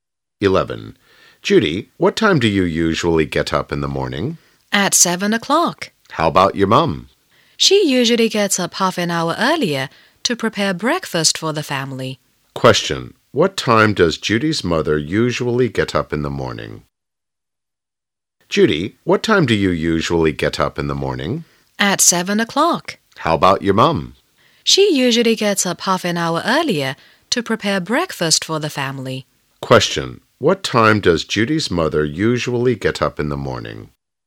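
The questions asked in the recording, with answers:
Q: What time does Judy's mother usually get up in the morning?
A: At 6:30.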